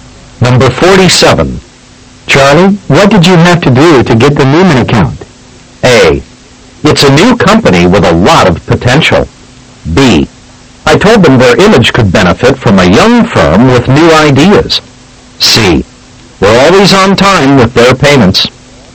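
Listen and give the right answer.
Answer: B: I told them their image could benefit from a young firm with new ideas.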